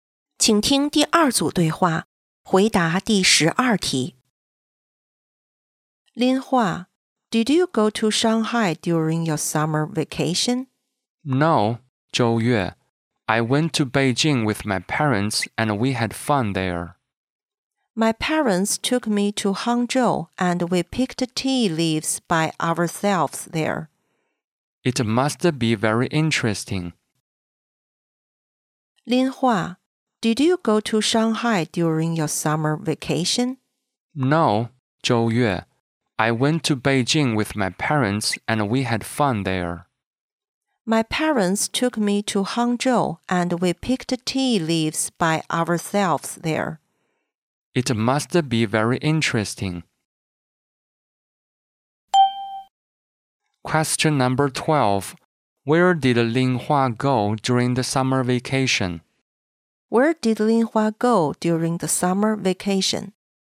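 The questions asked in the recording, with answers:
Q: Where did Lin Hua go during the summer vacation?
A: Beijing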